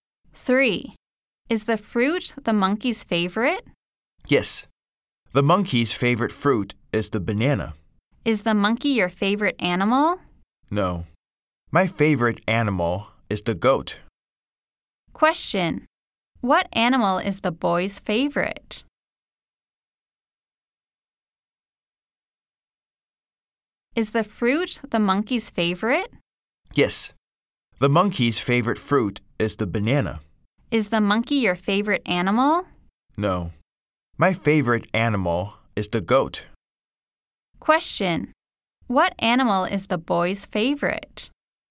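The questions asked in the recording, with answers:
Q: Question, what animal is the boy's favorite?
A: The goat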